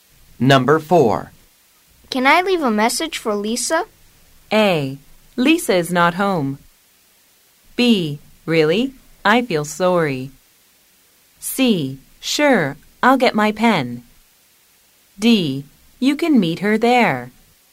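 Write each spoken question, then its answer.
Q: Can I leave a message for Lisa?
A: C: Sure, I'll get my pen.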